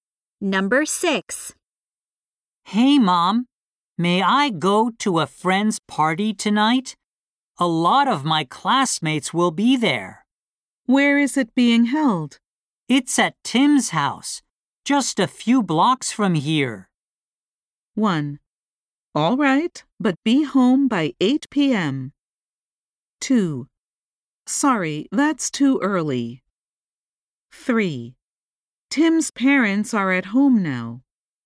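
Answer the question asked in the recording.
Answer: 1: All right, but be home by 8 p.m.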